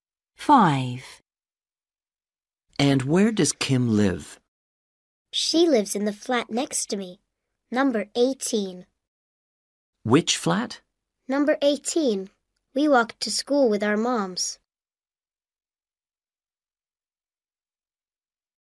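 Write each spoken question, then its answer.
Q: And where does Kim live?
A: Flat number 18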